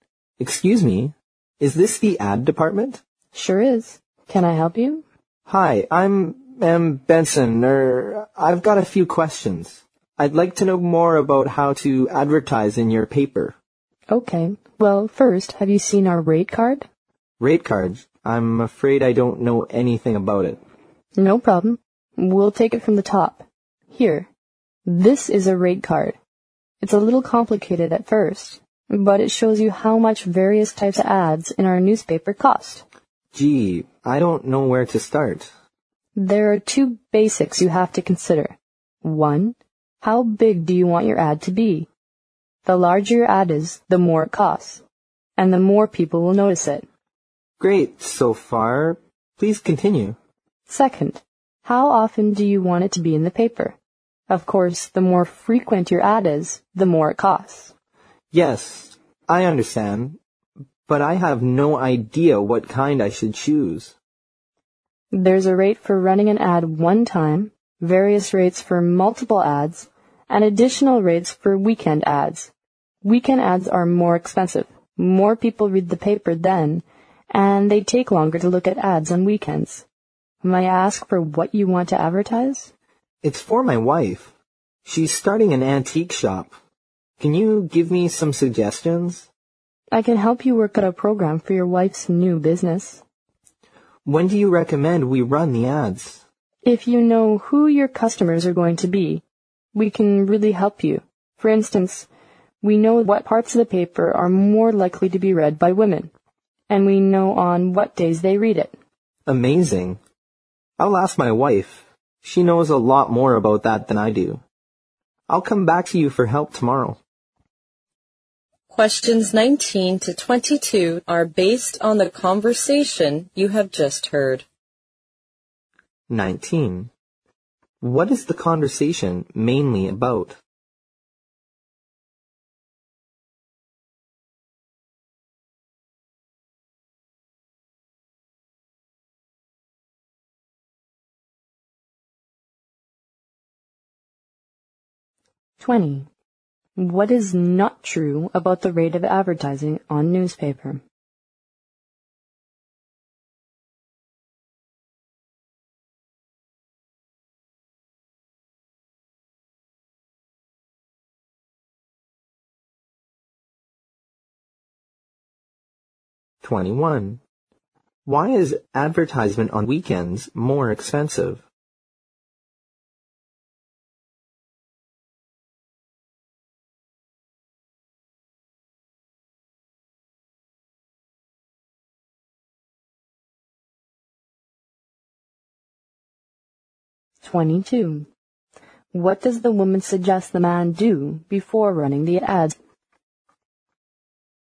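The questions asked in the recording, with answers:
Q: What is the conversation mainly about?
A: How to advertise in a newspaper

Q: Why is advertisement on weekends more expensive?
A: More people read the paper then and they look at ads longer

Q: What does the woman suggest the man do before running the ads?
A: Find out who the customers are going to be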